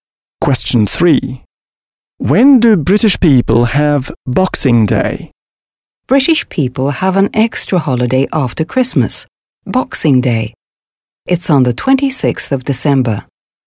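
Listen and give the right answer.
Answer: On the 26th of December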